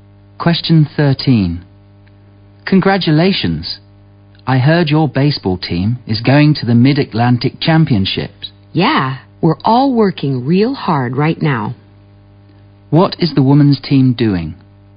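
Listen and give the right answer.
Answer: Training hard for the Mid-Atlantic Championships.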